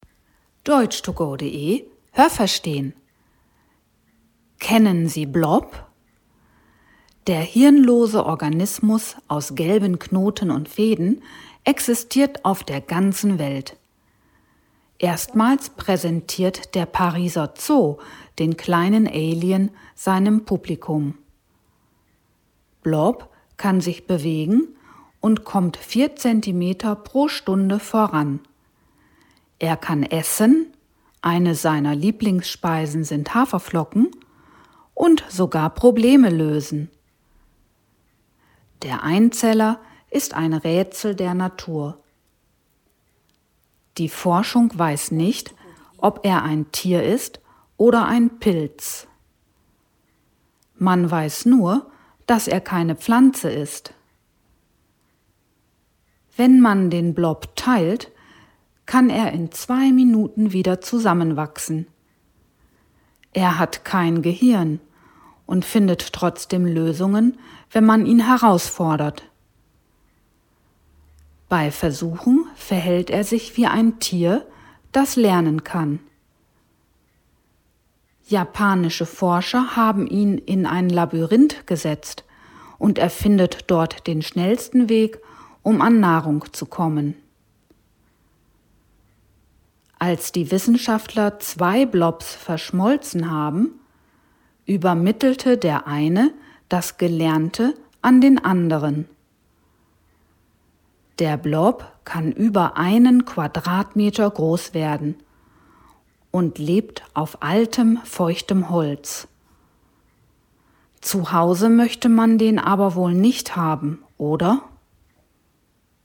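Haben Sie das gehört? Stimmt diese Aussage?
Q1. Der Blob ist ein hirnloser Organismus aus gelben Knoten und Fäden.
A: Richtig

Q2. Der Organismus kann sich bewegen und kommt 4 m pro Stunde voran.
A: Falsch

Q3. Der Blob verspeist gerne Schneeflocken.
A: Falsch

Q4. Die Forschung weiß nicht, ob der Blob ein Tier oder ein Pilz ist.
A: Richtig

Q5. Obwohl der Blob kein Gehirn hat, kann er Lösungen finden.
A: Richtig

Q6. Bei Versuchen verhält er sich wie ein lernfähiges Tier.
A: Richtig

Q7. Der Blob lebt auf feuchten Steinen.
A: Falsch

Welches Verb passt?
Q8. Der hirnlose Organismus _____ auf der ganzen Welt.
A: existiert

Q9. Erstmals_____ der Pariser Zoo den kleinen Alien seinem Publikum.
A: präsentiert

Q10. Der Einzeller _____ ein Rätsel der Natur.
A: ist

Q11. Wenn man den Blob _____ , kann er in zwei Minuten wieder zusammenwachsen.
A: teilt

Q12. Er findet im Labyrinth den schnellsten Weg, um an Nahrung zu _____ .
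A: kommen

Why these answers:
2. Er schafft nur 4 cm pro Stunde.
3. Aber er mag gerne Haferflocken.
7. Er lebt auf altem, feuchtem Holz.

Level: C (schwer)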